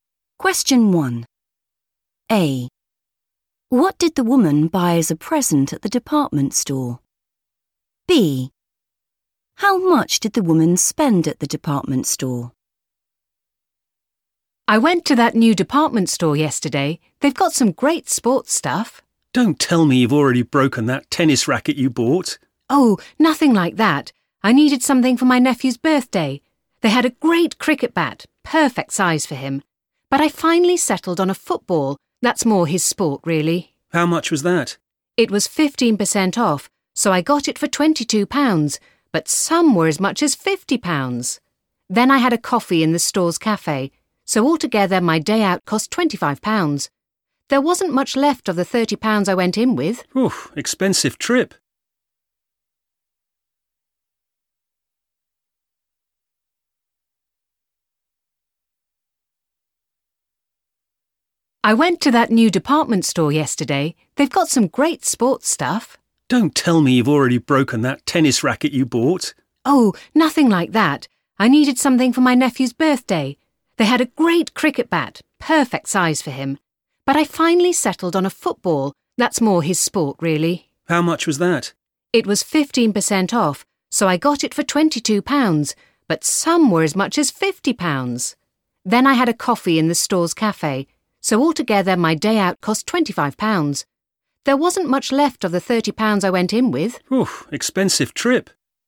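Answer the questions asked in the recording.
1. a football
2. £25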